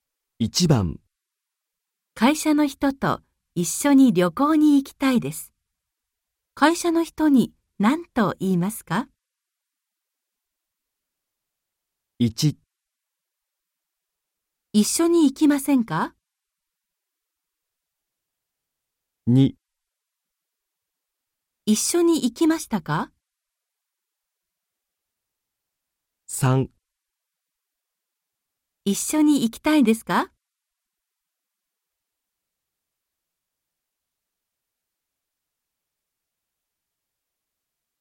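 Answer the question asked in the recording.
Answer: 1: 一緒に行きませんか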